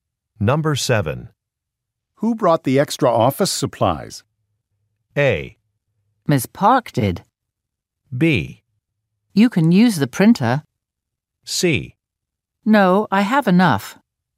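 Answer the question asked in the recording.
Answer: A: Ms. Park did.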